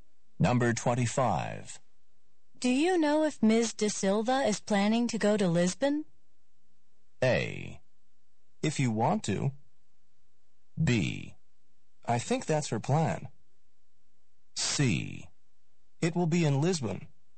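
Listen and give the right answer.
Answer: B: I think that's her plan.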